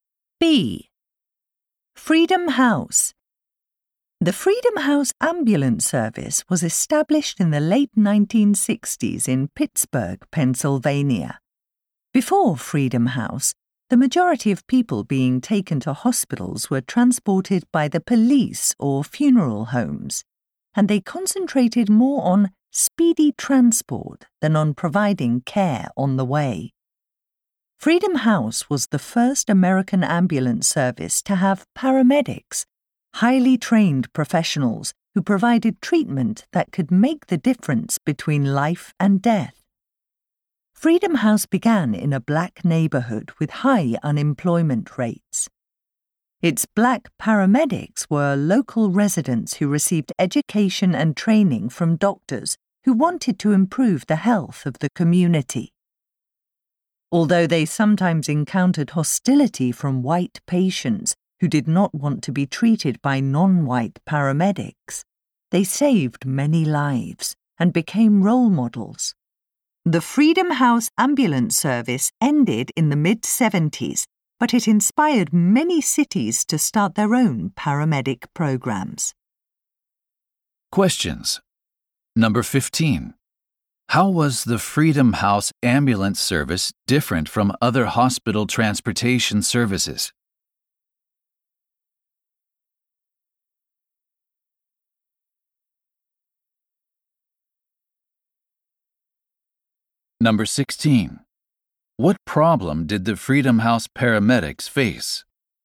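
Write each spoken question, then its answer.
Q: How was the Freedom House Ambulance Service different from other hospital transportation services?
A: It had trained paramedics who gave care on the way

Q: What problem did the Freedom House paramedics face?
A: Some white patients were hostile to them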